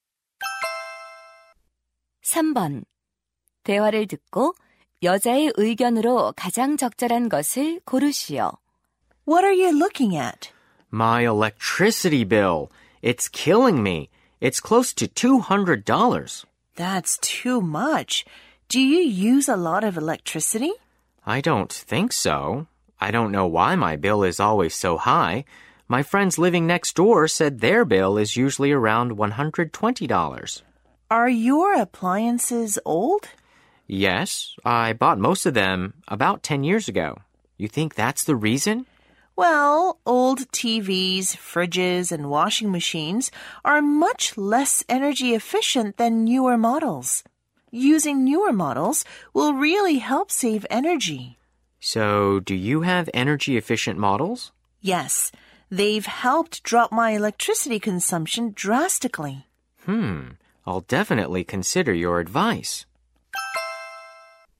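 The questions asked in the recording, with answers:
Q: 대화를 듣고 여자의 의견으로 가장 적절한 것을 고르시오.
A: 에너지 효율이 높은 새 가전제품을 쓰면 에너지를 절약할 수 있다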